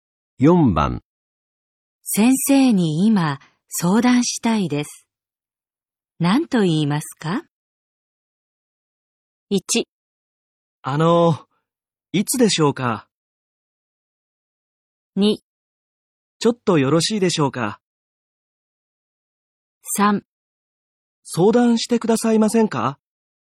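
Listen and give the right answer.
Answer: 2: ちょっとよろしいでしょうか?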